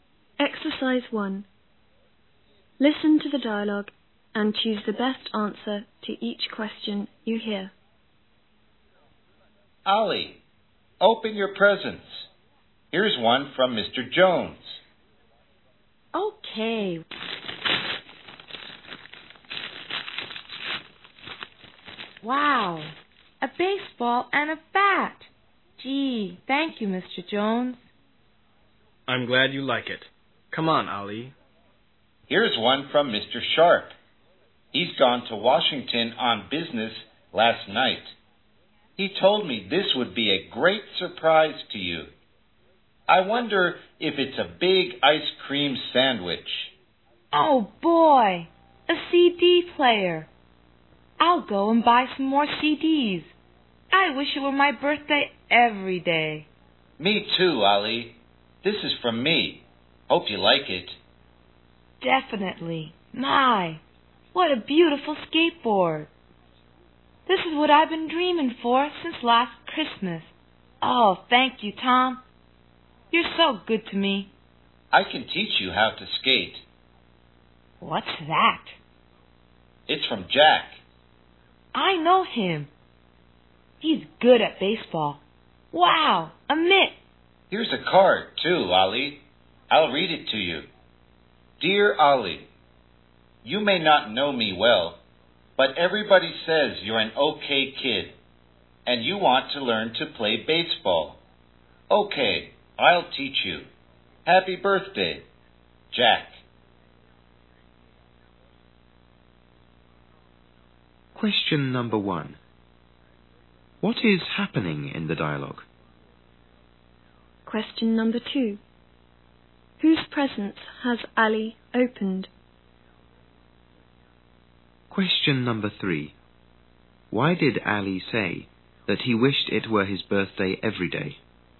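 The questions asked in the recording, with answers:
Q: What is happening in the dialogue?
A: Ali is opening his birthday presents.

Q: Whose presence has Ali opened?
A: Mr. Jones's, Mr. Sharp's, Tom's and Jack's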